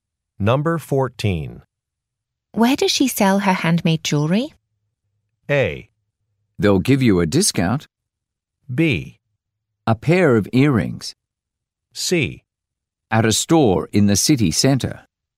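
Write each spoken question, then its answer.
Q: Where does she sell her handmade jewelry?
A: C: At a store in the city center.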